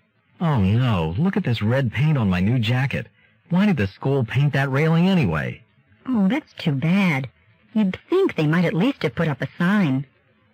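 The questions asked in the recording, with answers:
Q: What does the woman imply?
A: The school should have put up a sign warning about the wet paint.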